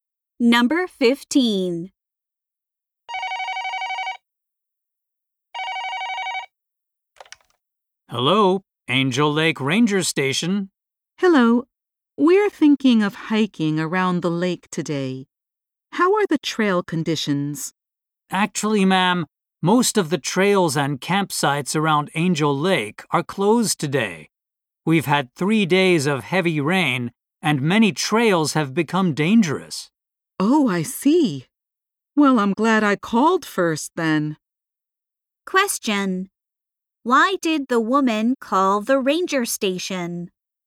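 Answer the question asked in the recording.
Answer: To ask about trail conditions for hiking.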